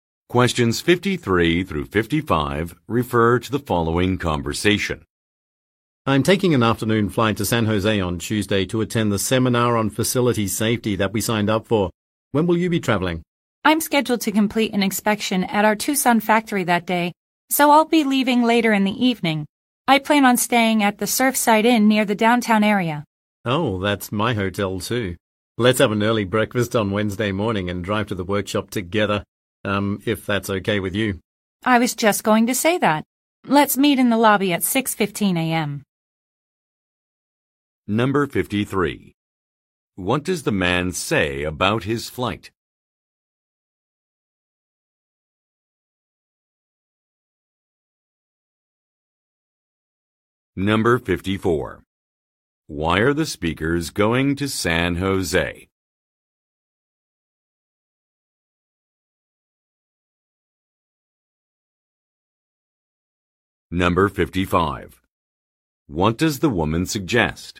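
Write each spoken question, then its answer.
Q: Why are the speakers going to San Jose?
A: To attend a seminar on facility safety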